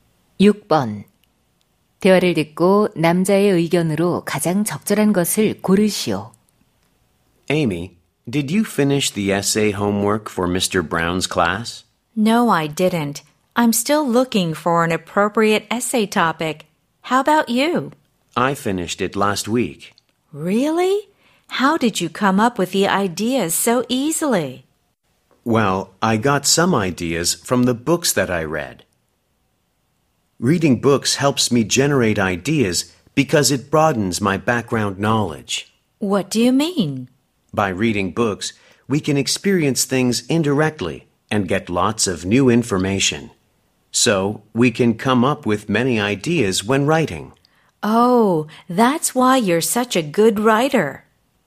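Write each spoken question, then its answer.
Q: 대화를 듣고 남자의 의견으로 가장 적절한 것을 고르시오.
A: 독서는 글쓰기 아이디어를 떠올리는 데 도움이 된다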